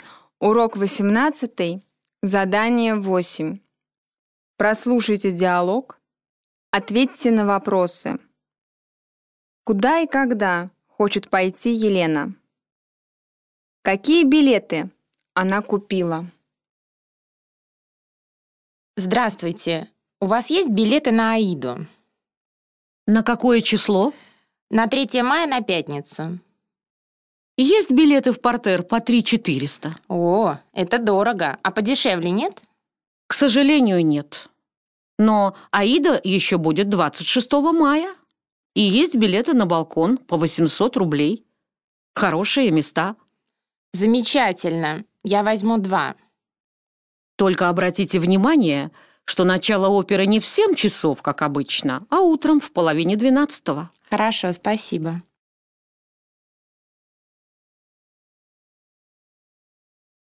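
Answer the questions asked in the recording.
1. На оперу «Аида» 3 мая, в пятницу
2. Два билета на балкон по 800 рублей на 26 мая (начало в 11:30)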